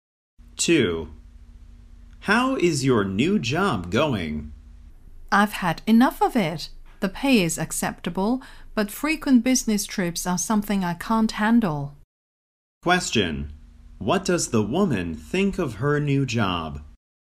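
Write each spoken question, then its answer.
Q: What does the woman think of her new job?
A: She can't stand the frequent business trips.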